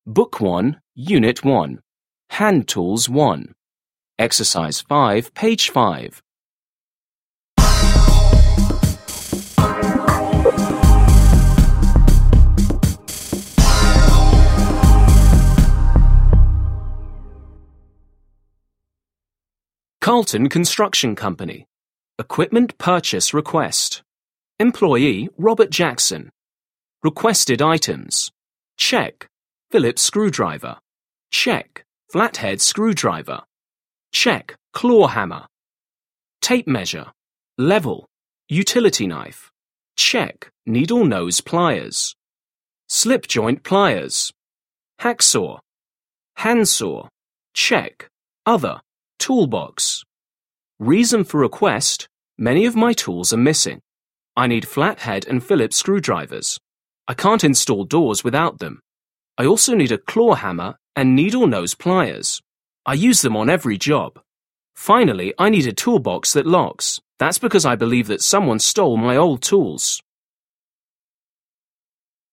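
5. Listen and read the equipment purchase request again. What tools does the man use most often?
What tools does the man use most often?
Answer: a claw hammer and needle-nose pliers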